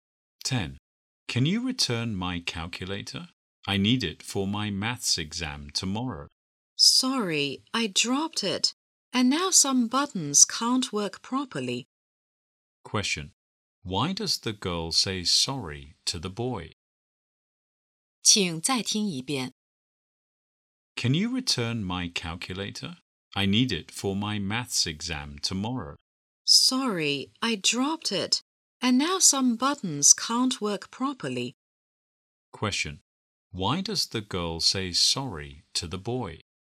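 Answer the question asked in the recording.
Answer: She broke his calculator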